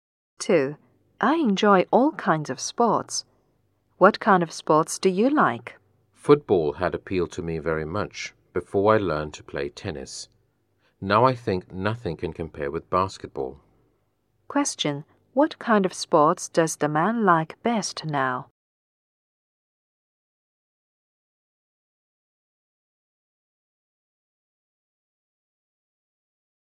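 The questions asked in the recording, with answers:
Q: What kind of sports does the man like best now?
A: Basketball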